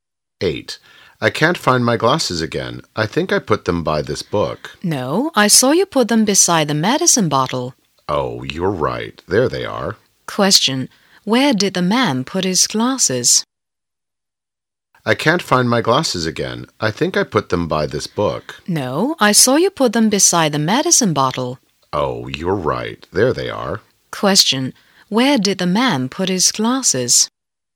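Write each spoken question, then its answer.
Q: Where did the man put his glasses?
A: Beside the medicine bottle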